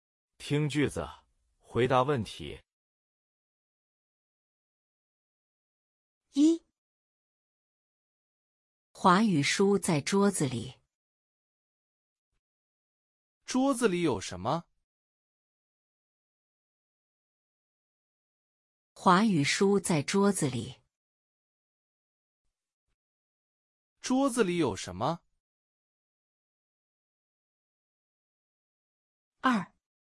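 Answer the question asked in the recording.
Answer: 华语书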